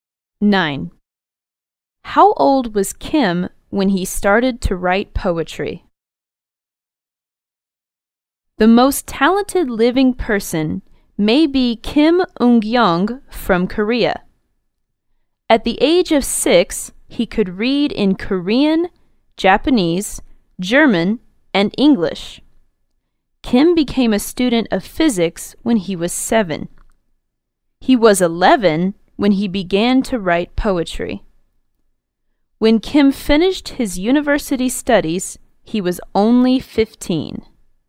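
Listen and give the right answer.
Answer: 11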